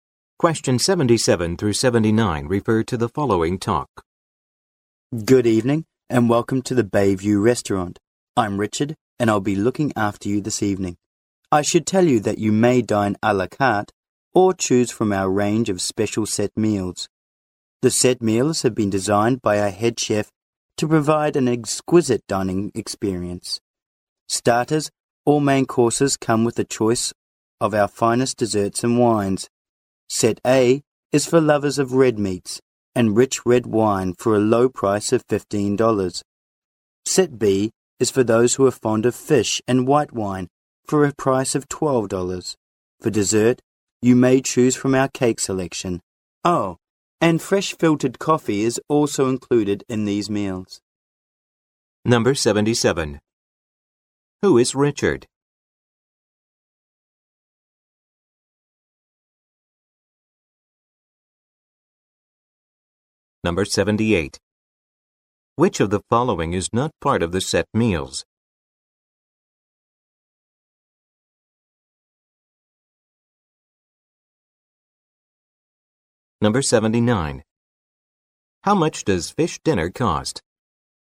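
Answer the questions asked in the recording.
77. A waiter
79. $12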